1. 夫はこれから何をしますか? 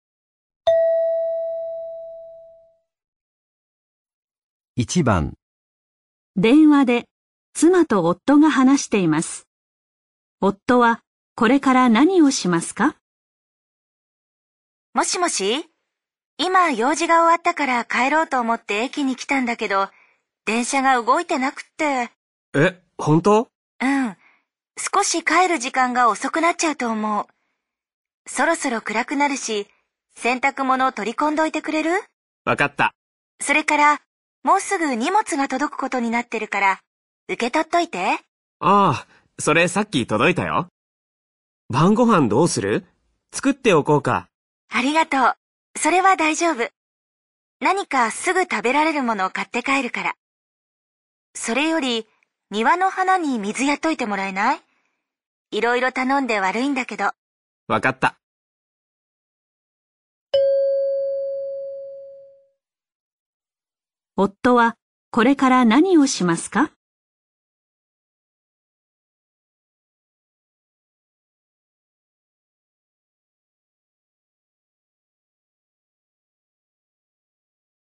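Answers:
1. 洗濯物を取り込んで、庭の花に水をやる

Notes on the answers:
原文中妻子说现在因为电车还没有开,自己可能会回去晚一点。并让丈夫把洗了的衣服收进来、收下马上寄到的行李、给院子里的花浇水。而丈夫已经收下了行李,并且不用做饭。综上分析,正确答案为2,收衣服和浇花。

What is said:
電話で、妻と夫が話しています。
女:もしもし、今用事が終わったから帰ろうと思って駅に来たんだけど、電車が動いてなくて。
男:ええ?
本当?
女:うん。
少し帰る時間が遅くなっちゃうと思う。
そろそろ暗くなるし、洗濯物取り込んどいてくれる?
男:分かった。
女:それから、もうすぐ荷物が届くことになってるから、受け取っといて。
男:ああ、それさっき届いたよ。
晩御飯どうする?
作っておこうか。
女:ありがとう。
それは大丈夫。
何かすぐ食べられるものを買って帰るから。
それより、庭の花に水やっといてもらえない?
いろいろ頼んで悪いんだけど。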